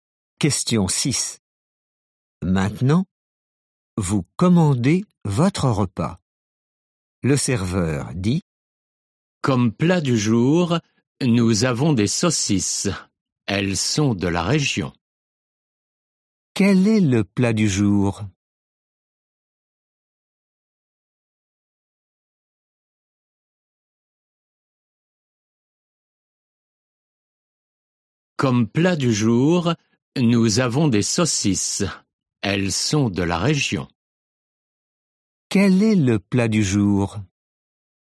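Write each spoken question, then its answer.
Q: Quel est le plat du jour?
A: Des saucisses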